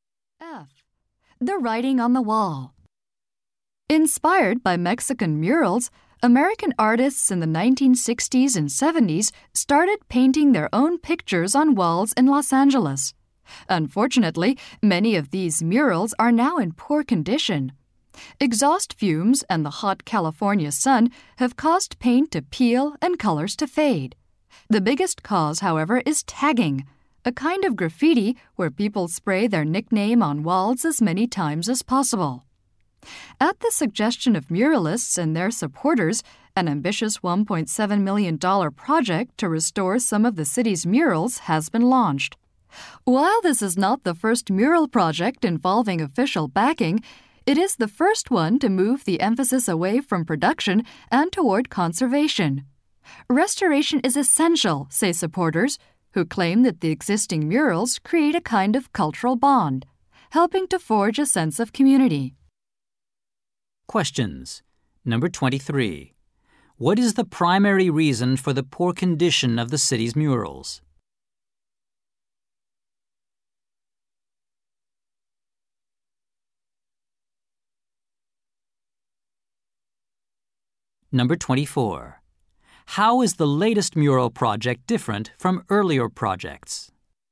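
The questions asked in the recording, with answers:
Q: What is the primary reason for the poor condition of the city's murals?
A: Tagging (graffiti)

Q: How is the latest mural project different from earlier projects?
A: It focuses on conserving murals rather than producing new ones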